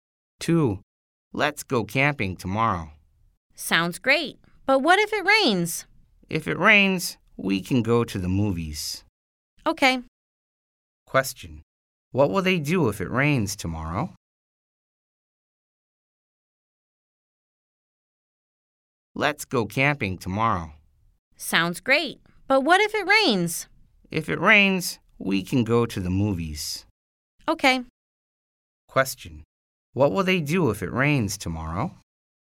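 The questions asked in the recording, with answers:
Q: What will they do if it rains tomorrow?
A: Go to the movies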